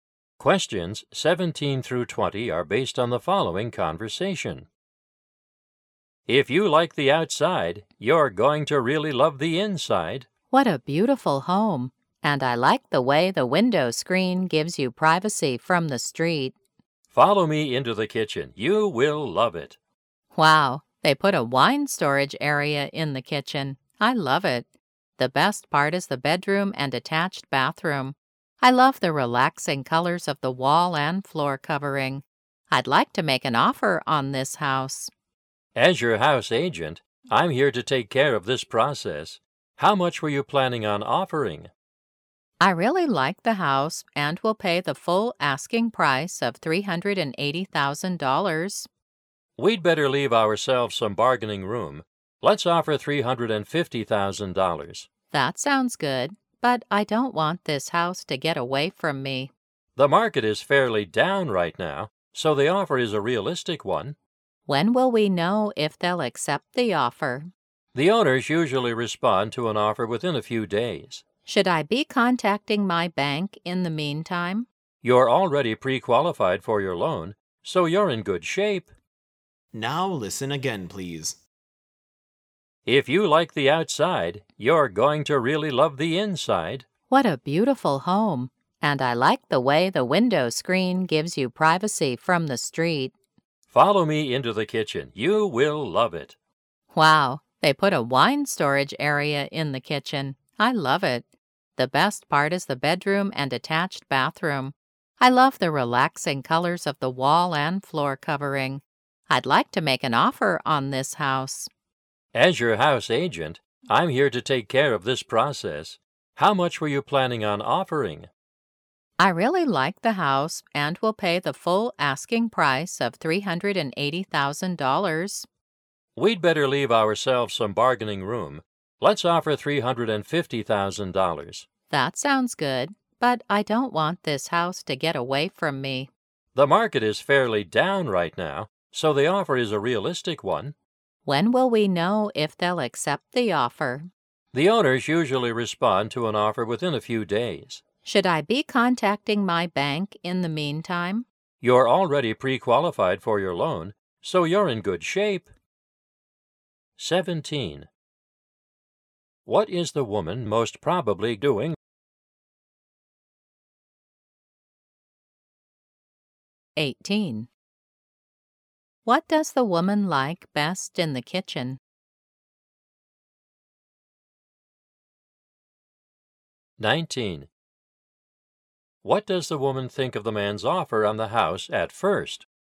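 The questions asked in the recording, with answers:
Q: What is the woman most probably doing?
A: Looking at a house to buy

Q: What does the woman like best in the kitchen?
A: The wine storage area

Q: What does the woman think of the man's offer on the house at first?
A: She fears it is too low and she may lose the house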